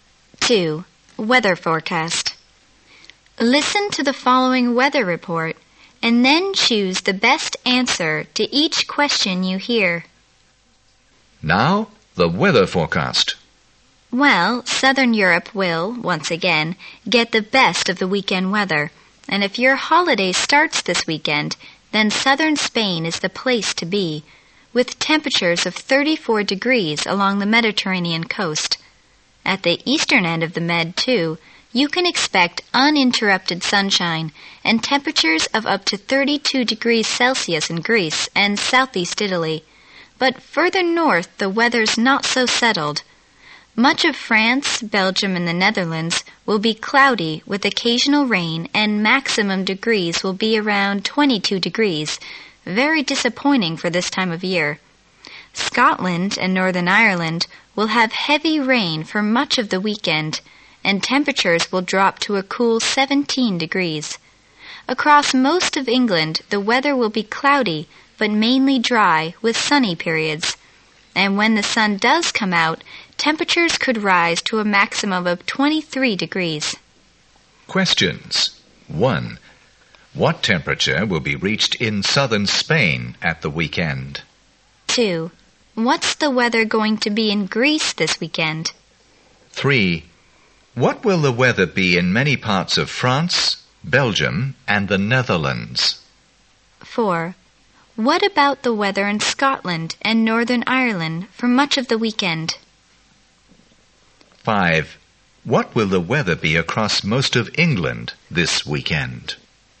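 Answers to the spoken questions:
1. 34 degrees
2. Uninterrupted sunshine, up to 32 degrees Celsius
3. Cloudy with occasional rain, around 22 degrees
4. Heavy rain, with temperatures dropping to 17 degrees
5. Cloudy but mainly dry with sunny periods, up to 23 degrees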